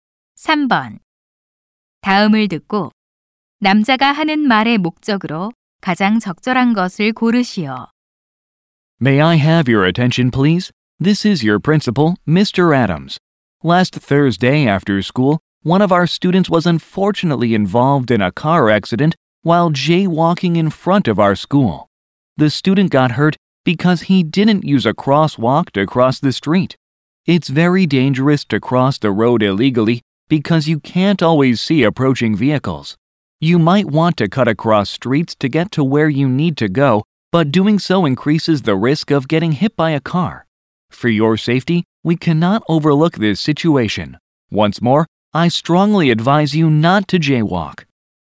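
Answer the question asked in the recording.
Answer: 학생들에게 무단횡단을 하지 말라고 당부하려고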